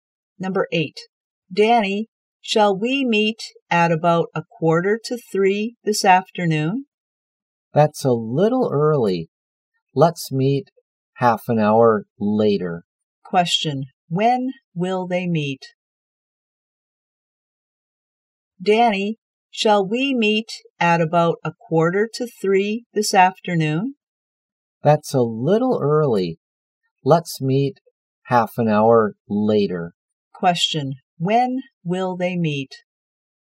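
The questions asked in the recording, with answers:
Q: When will they meet?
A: At 3:45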